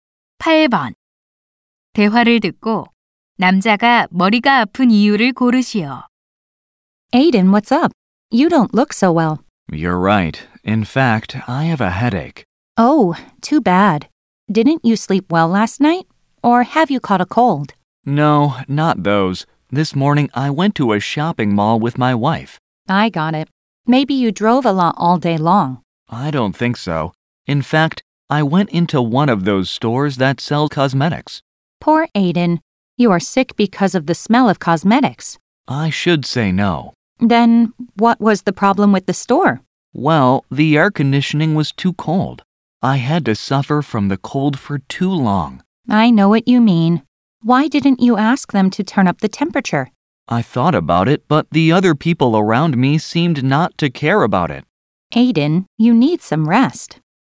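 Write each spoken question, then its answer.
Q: 대화를 듣고 남자가 머리가 아픈 이유를 고르시오.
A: 매장의 에어컨이 너무 추워서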